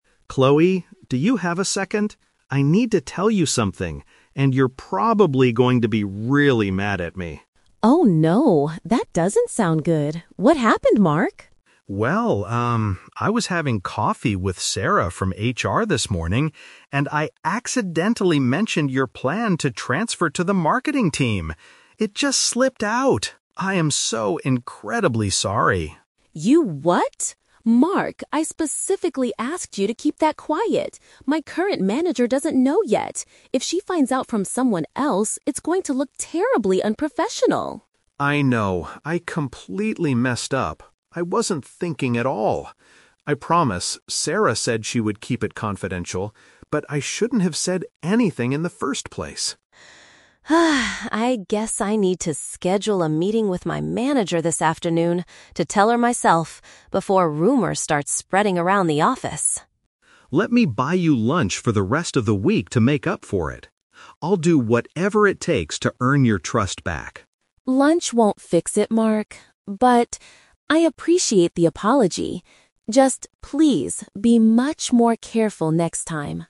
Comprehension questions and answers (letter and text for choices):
Listen to a conversation between two colleagues. Choose the best answer (A, B, or C) for each question.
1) What secret did Mark accidentally reveal?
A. Chloe is looking for a job at a different company.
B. Chloe wants to change her current working department.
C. Chloe is secretly complaining about the Human Resources team.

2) Why is Chloe worried about the situation?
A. Her supervisor might hear the news from another person.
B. Sarah from HR is famous for spreading false rumors.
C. She does not have the right skills for the marketing position.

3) What does Chloe plan to do next?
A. Let Mark pay for her meals for the whole week.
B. Ask Sarah directly to keep the information private.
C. Have a direct conversation with her boss today.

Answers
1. B. Chloe wants to change her current working department.
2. A. Her supervisor might hear the news from another person.
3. C. Have a direct conversation with her boss today.

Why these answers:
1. Mark says he accidentally mentioned Chloe's plan to "transfer to the marketing team." Paraphrasing: transfer to the marketing team = change her current working department. Trap: Option A is a distractor because she wants to move to another team within the same company, not a "different company." Option C is a trap because "HR" is mentioned, but she isn't complaining about them.
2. Chloe states that her current manager doesn't know yet, and if she "finds out from someone else," it will look unprofessional. Paraphrasing: manager = supervisor; find out = hear the news. Trap: Option B is a trap. The word "rumors" is used by Chloe, but she never says Sarah is famous for spreading them (in fact, Mark says Sarah promised to keep it confidential). Option C is plausible in reality but is not mentioned in the audio.
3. Chloe decides to "schedule a meeting with my manager this afternoon to tell her myself." Paraphrasing: schedule a meeting to tell her myself = have a direct conversation; manager = boss; this afternoon = today. Trap: Option A is a trap because Mark offers to buy her lunch, but she says "Lunch won't fix it" and doesn't state this as her plan. Option B is incorrect because Mark already talked to Sarah about keeping it confidential.

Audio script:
Mark: Chloe, do you have a second? I need to tell you something, and you're probably going to be really mad at me.
Chloe: Oh no, that doesn't sound good. What happened, Mark?
I was having coffee with Sarah from HR this morning, and I accidentally mentioned your plan to transfer to the marketing team. It just slipped out! I am so incredibly sorry.
Chloe: You what?! Mark, I specifically asked you to keep that quiet! My current manager doesn't know yet. If she finds out from someone else, it's going to look terribly unprofessional.
Mark: I know, I completely messed up. I wasn't thinking at all. I promise Sarah said she would keep it confidential, but I shouldn't have said anything in the first place.
Chloe: (Sighs) I guess I need to schedule a meeting with my manager this afternoon to tell her myself, before rumors start spreading around the office.
Mark: Let me buy you lunch for the rest of the week to make up for it. I'll do whatever it takes to earn your trust back.
Chloe: Lunch won't fix it, Mark, but... I appreciate the apology. Just please, be much more careful next time.